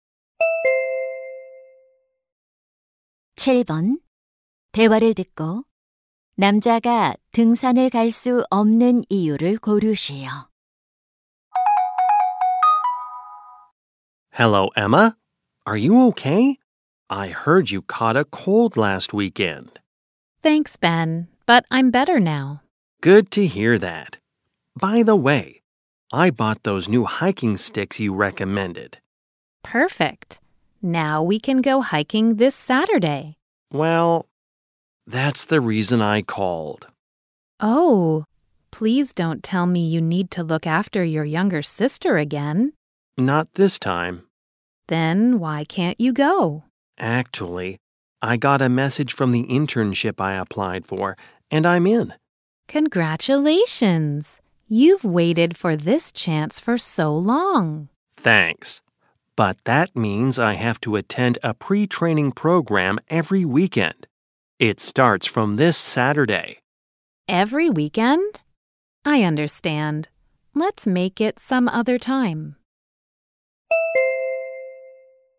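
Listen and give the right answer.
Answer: 인턴십 사전 교육 프로그램에 참석해야 해서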